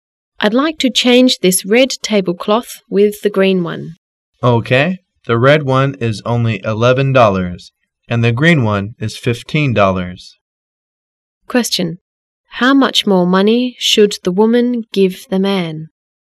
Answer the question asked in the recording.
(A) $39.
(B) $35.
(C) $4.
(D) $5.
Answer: (C) $4.

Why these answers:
W: I'd like to change this red table cloth with the green one. M: Ok. The red one is only $ 11, and the green one is $ 15. Q: How much more money should the woman give the man?